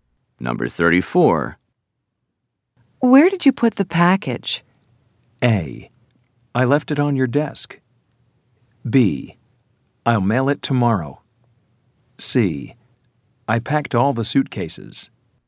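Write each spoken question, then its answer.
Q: Where did you put the package?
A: A: I left it on your desk.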